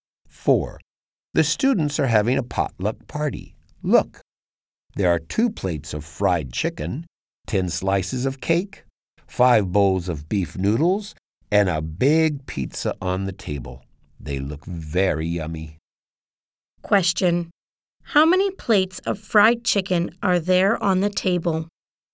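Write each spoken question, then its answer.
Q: How many plates of fried chicken are there on the table?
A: 2 plates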